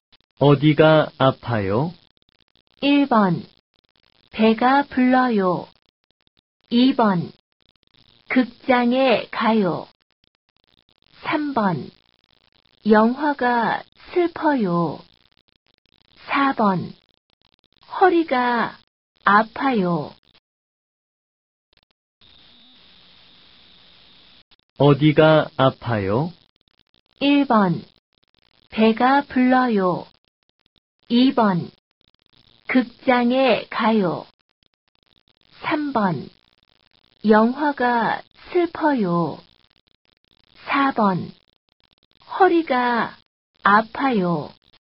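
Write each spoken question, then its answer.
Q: 어디가 아파요?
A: 4: 허리가 아파요.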